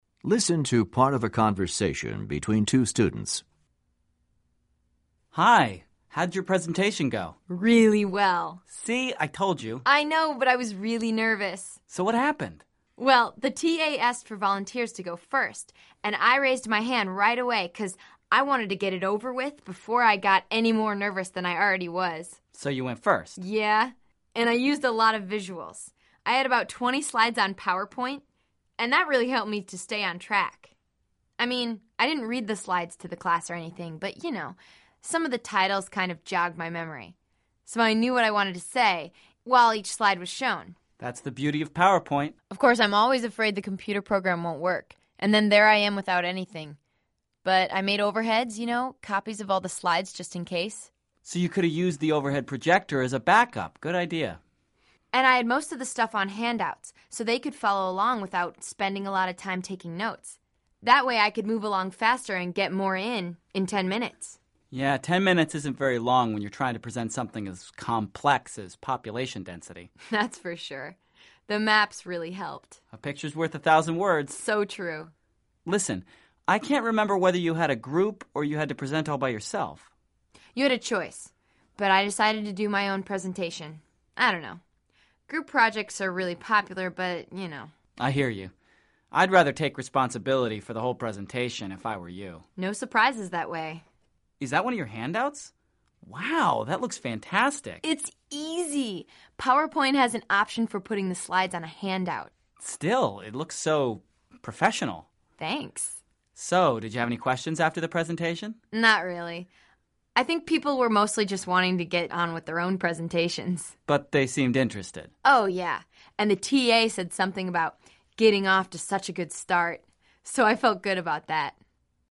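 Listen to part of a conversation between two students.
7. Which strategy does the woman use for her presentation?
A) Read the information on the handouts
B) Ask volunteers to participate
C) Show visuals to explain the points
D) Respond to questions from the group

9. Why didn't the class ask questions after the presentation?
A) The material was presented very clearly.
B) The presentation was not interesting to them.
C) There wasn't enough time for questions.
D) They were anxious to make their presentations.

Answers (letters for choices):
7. C
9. D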